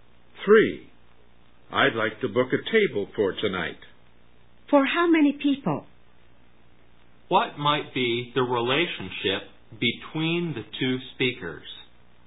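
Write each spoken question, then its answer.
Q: What might be the relationship between the 2 speakers?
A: Customer and restaurant staff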